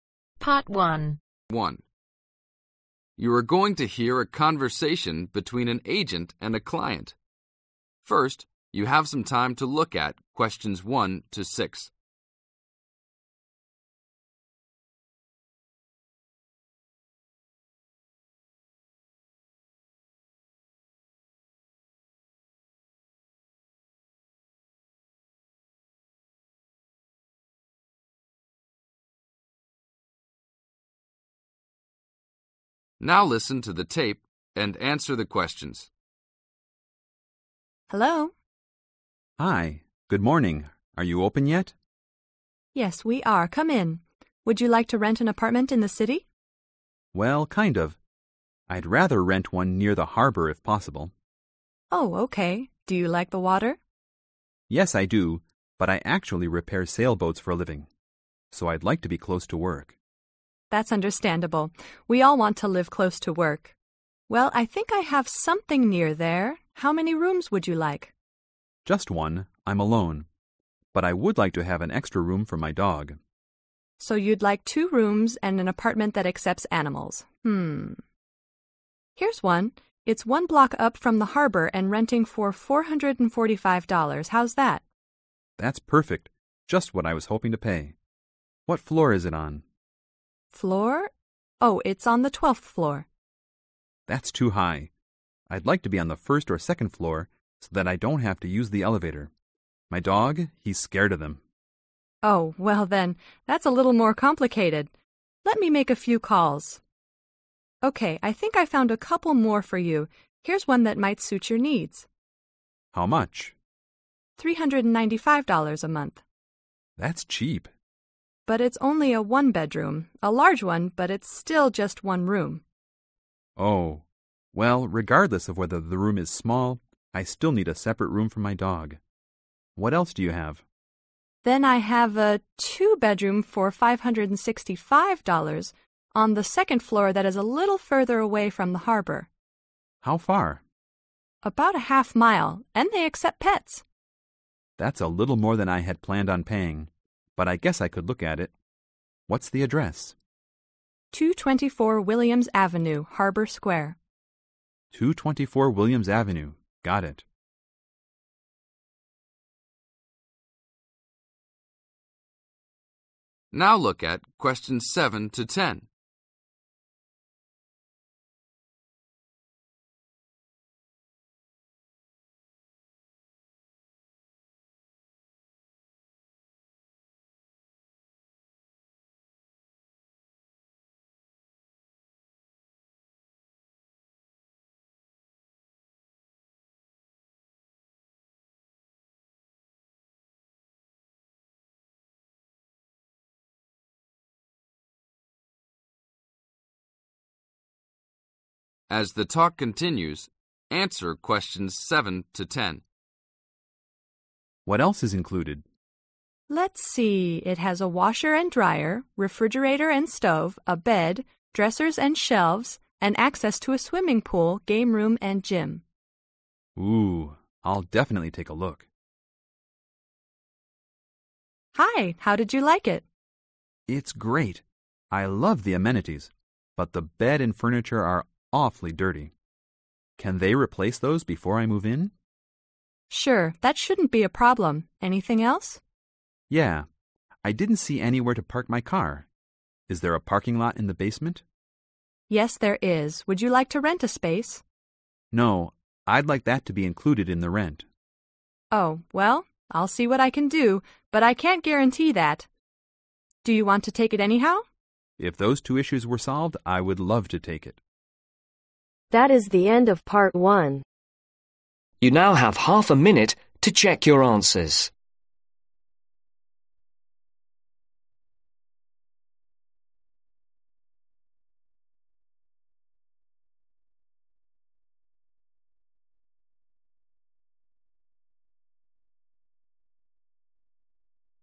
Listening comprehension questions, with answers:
Circle the appropriate letter.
Address: (6)............ Avenue, Harbor Square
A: 224 Williams